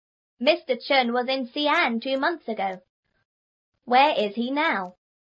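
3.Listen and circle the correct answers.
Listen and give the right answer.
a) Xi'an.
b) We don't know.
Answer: b) We don't know.

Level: 初中英语广州版3B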